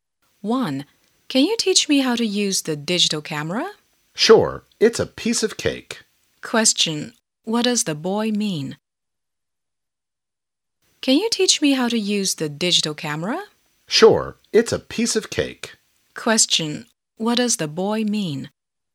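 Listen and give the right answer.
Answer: It's very easy to use the digital camera.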